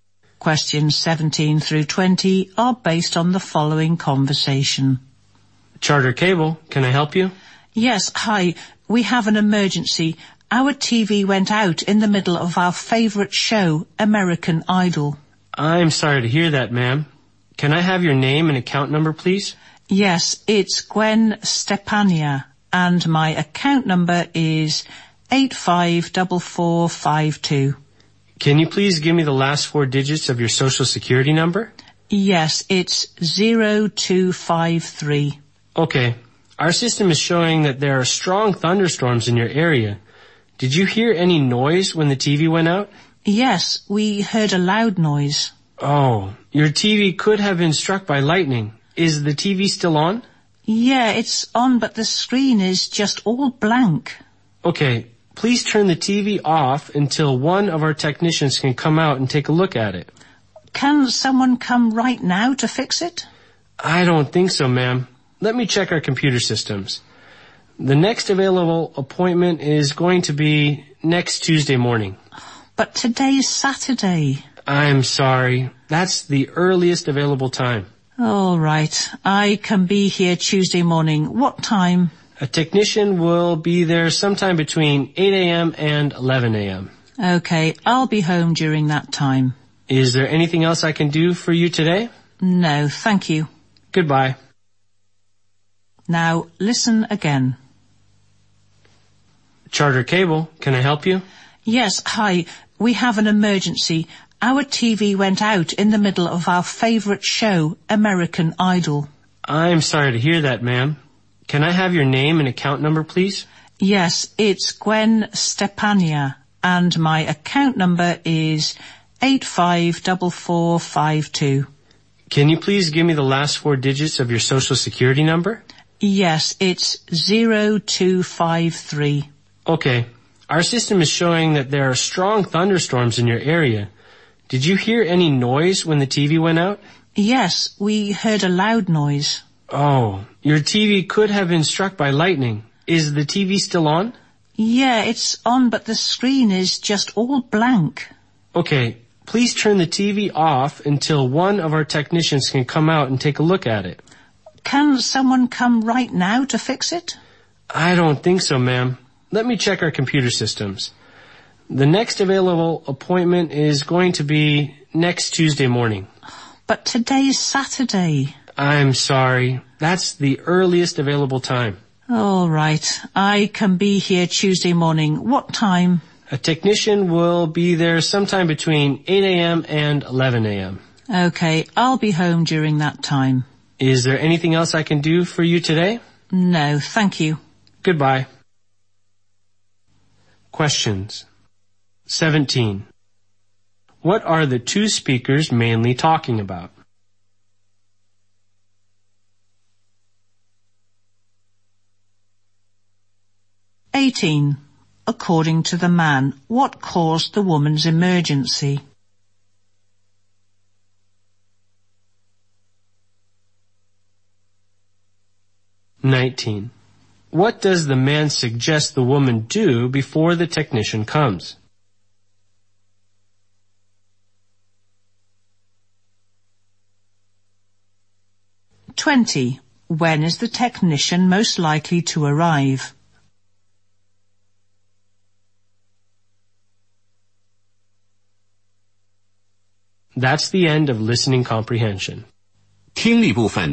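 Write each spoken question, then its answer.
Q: What are the two speakers mainly talking about?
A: The woman's broken TV and a repair appointment

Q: According to the man, what caused the woman's emergency?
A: Lightning

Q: What does the man suggest the woman do before the technician comes?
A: Turn the TV off

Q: When is the technician most likely to arrive?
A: Next Tuesday between 8 and 11 a.m.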